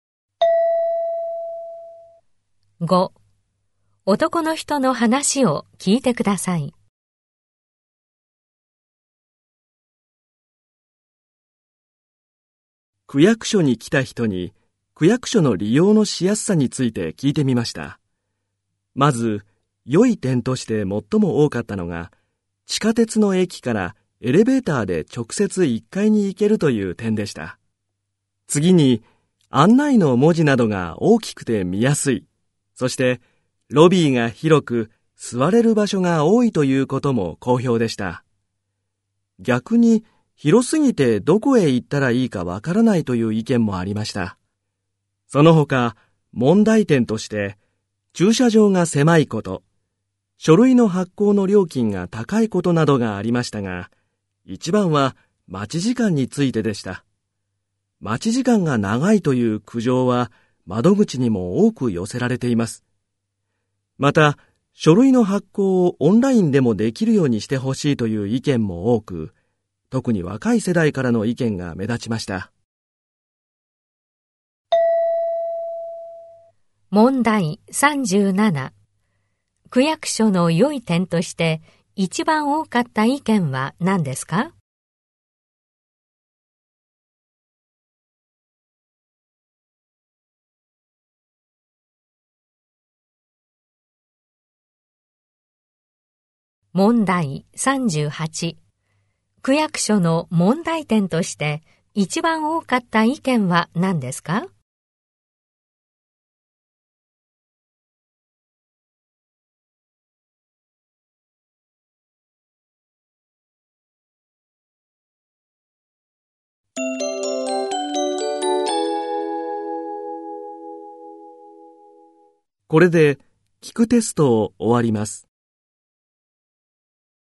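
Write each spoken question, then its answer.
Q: 区役所の良い点として一番多かった意見は何ですか?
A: 地下鉄の駅からエレベーターで直接1階に行ける

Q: 区役所の問題点として一番多かった意見は何ですか?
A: 待ち時間が長い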